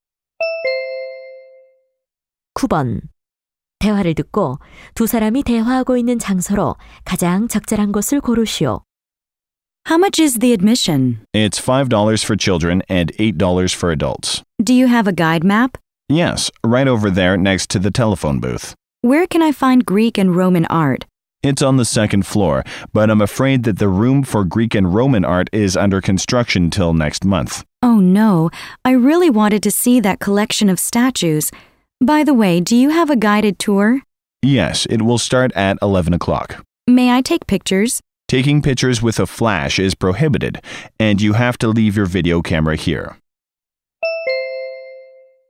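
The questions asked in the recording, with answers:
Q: 대화를 듣고 두 사람이 대화하고 있는 장소로 가장 적절한 곳을 고르시오.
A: 미술관(박물관)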